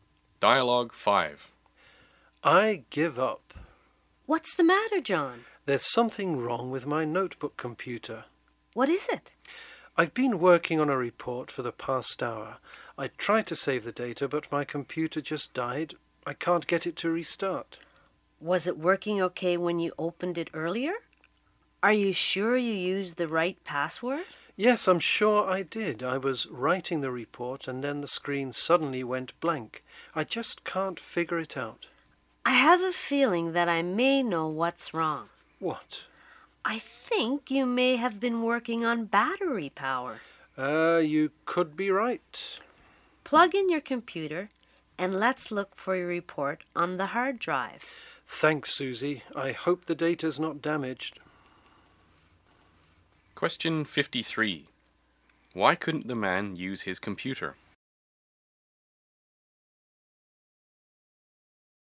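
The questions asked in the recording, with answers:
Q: Why couldn't the man use his computer?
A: Its battery ran out (he was working on battery power)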